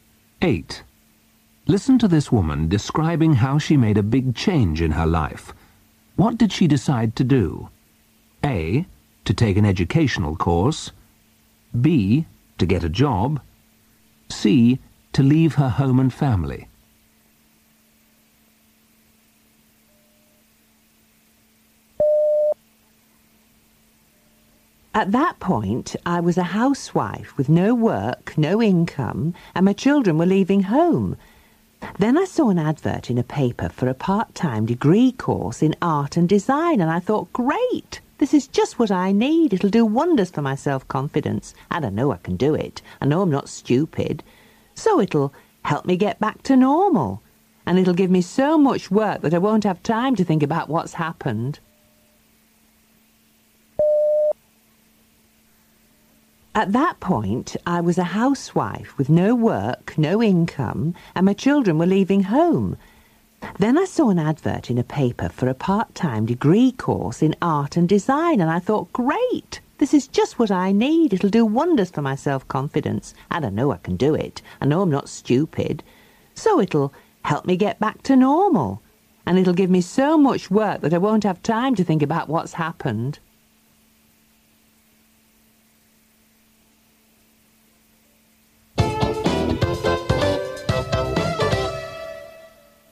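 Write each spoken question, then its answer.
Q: What did she decide to do?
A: A: To take an educational course.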